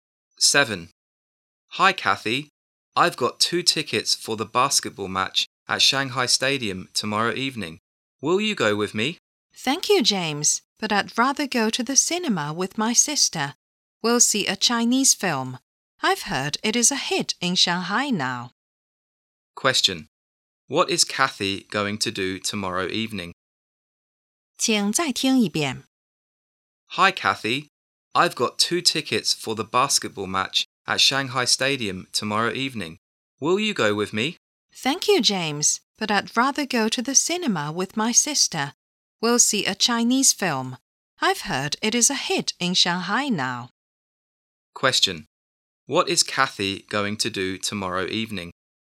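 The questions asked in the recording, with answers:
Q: What is Kathy going to do tomorrow evening?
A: Go to the cinema with her sister to see a Chinese film.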